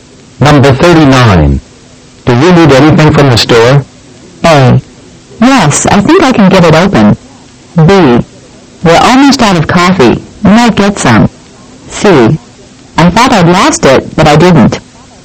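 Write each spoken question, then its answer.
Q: Do you need anything from the store?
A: B: We're almost out of coffee.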